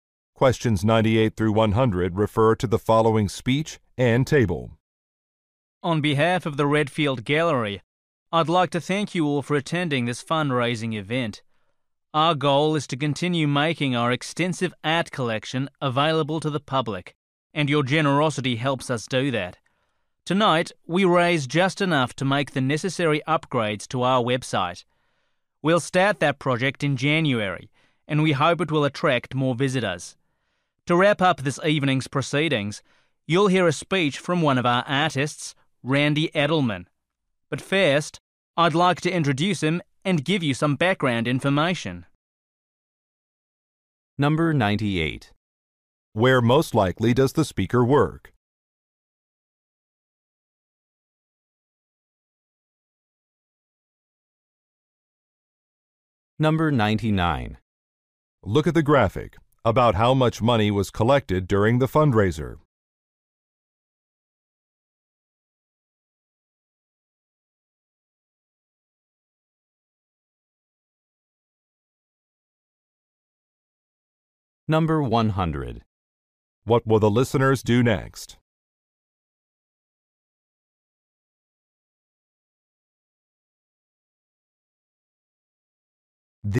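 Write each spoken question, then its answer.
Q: Where most likely does the speaker work?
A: At an art gallery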